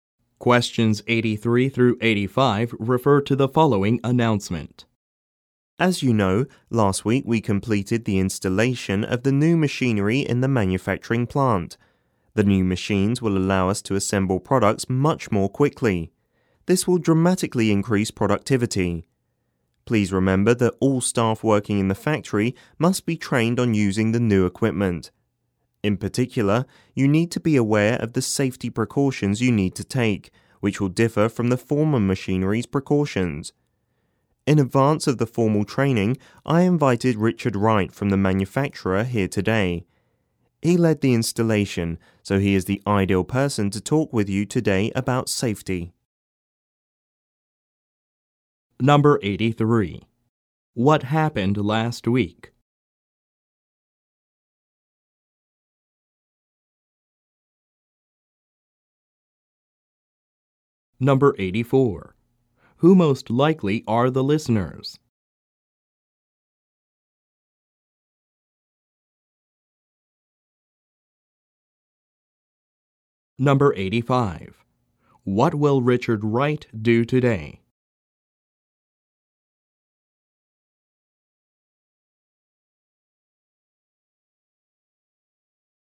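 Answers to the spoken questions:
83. New machinery was installed in the manufacturing plant.
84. Factory staff
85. Talk about safety with the new machines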